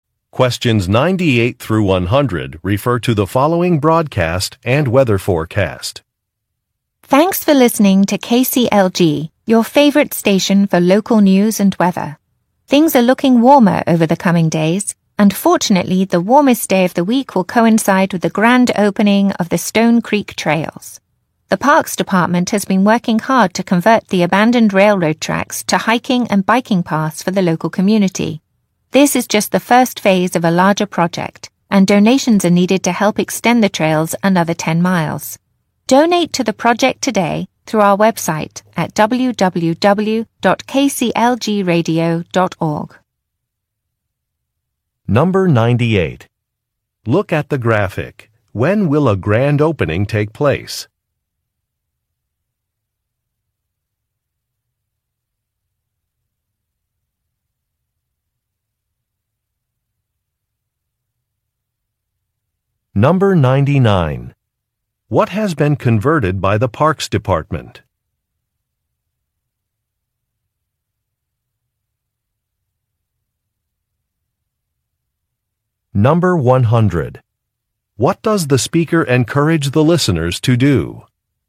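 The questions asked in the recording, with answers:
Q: What has been converted by the Parks Department?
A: Abandoned railroad tracks (into hiking and biking paths)

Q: What does the speaker encourage the listeners to do?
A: Donate to the trail project through the website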